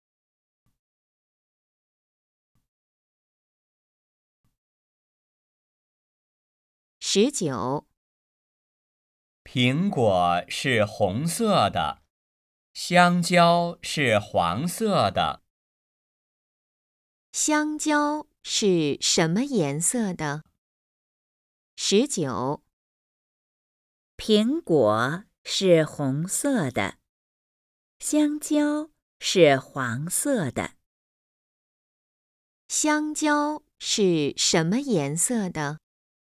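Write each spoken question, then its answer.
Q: 香蕉是什么颜色的?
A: 黄色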